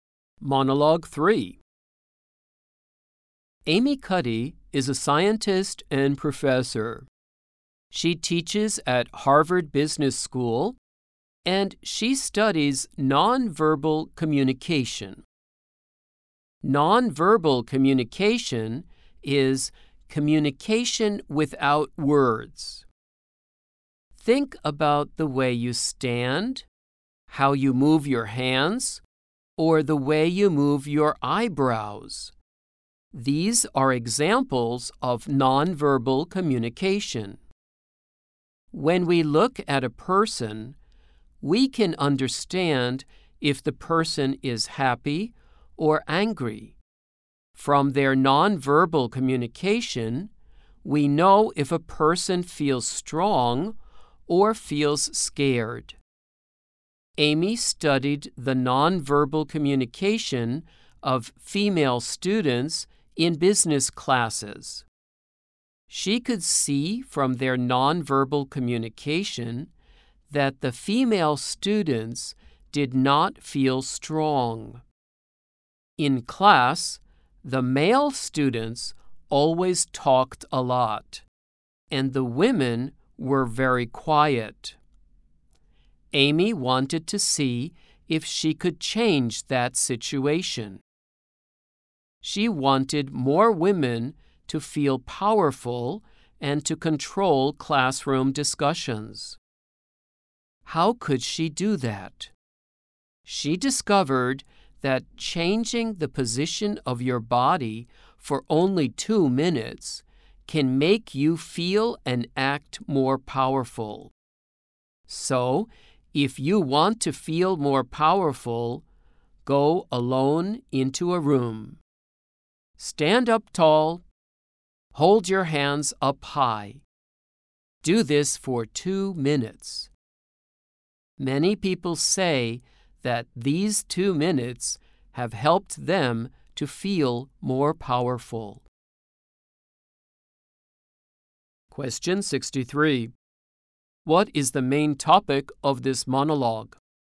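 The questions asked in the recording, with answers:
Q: What is the main topic of this monologue?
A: Nonverbal communication and how body position can make you feel more powerful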